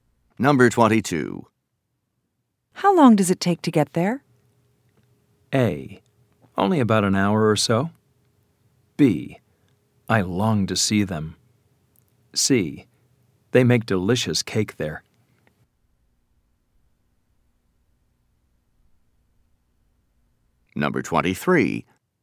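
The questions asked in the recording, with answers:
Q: How long does it take to get there?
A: A: Only about an hour or so.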